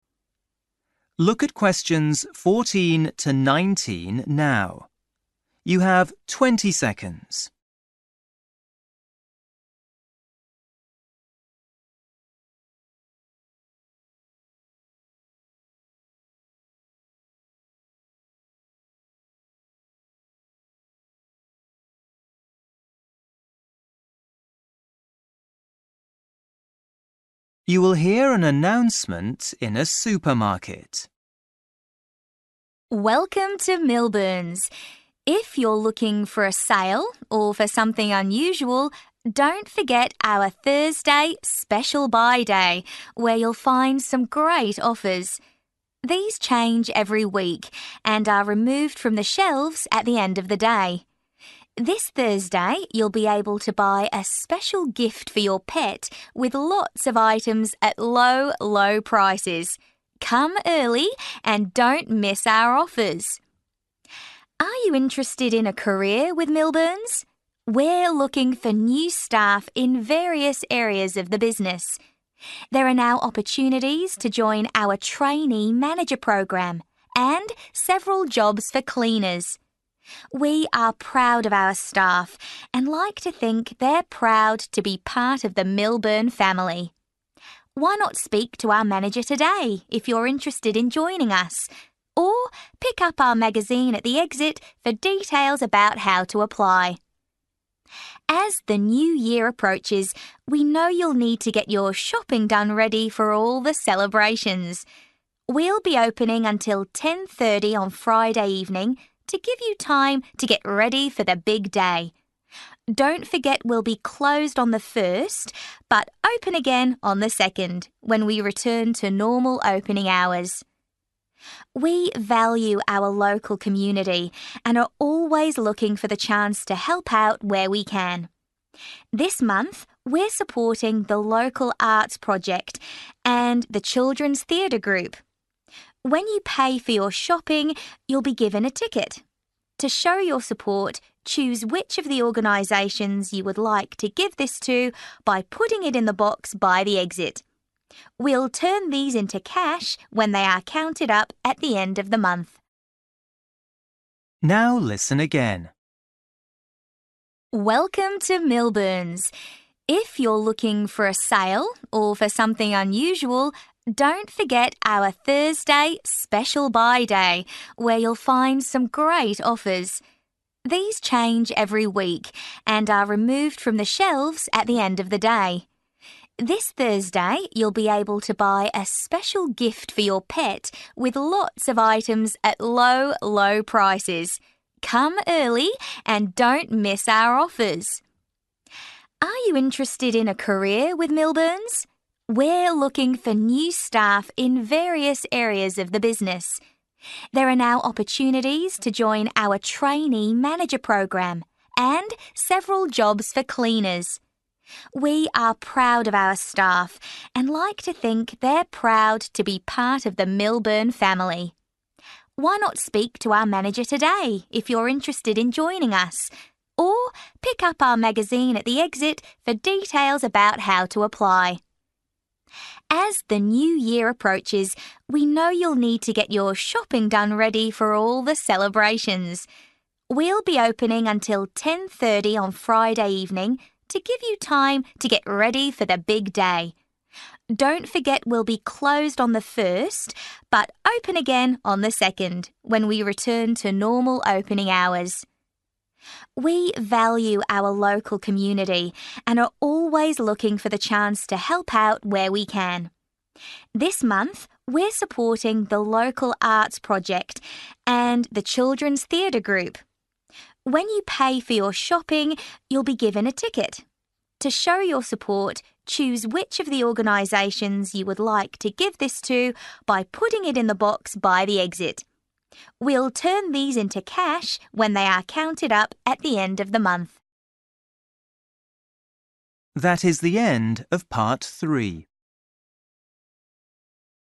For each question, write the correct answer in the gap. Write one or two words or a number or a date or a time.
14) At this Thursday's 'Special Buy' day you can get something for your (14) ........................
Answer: pet

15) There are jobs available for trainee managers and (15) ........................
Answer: cleaners

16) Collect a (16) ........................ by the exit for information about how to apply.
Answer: magazine

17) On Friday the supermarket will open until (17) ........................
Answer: 10.30

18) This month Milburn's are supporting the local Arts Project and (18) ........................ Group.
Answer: Children's Theatre

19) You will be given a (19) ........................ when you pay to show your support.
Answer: ticket

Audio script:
Woman: Welcome to Milburn's. If you're looking for a sale or for something unusual, don't forget our Thursday 'Special Buy' day where you'll find some great offers. These change every week and are removed from the shelves at the end of the day. This Thursday you'll be able to buy a special gift for your pet with lots of items at low. low prices. Come early and don't miss our offers.
Are you interested in a career with Milburn's? we're looking for new staff in various areas of the business. There are now opportunities to join our trainee manager programme and several jobs for cleaners. We are proud of our staff and like to think they're proud to be part of the Milburn family. Why not speak to our manager today if you're interested in joining us? Or pick up our magazine at the exit for details about how to apply.
As the New Year approaches we know you'll need to get your shopping done ready for all the celebrations. We'll be opening until 10.30 on Friday evening to give you time to get ready for the big day. Don't forget we'll be closed on the first but open again on the second, when we return to normal opening hours.
We value our local community and are always looking for the chance to help out where we can. This month we're supporting the local Arts Project and the Children's Theatre Group. When you pay for your shopping you'll be given a ticket. To show your support, choose which of the organisations you would like to give this to by putting it in the box by the exit. We'll turn these into cash when they are counted up at the end of the month.
Now listen again.

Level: PET (B1)